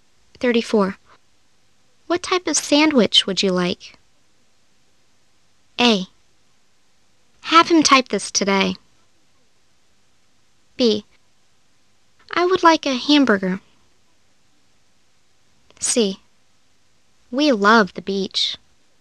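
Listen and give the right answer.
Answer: B: I would like a hamburger.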